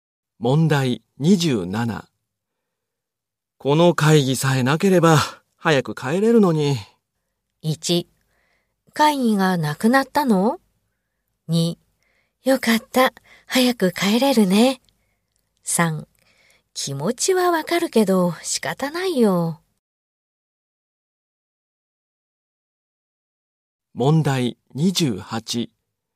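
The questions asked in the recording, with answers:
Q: この会議さえなければ早く帰れるのに。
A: 3: 気持ちはわかるけど仕方ないよ。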